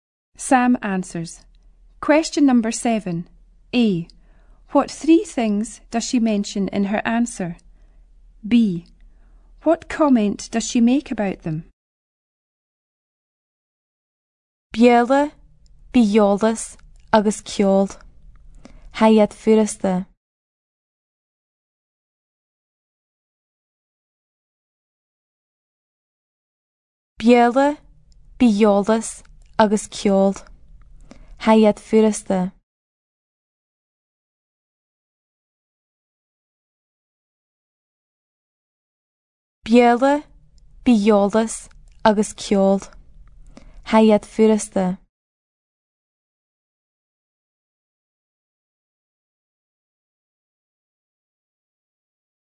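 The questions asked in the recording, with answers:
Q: B. What comment does she make about them?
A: They are easy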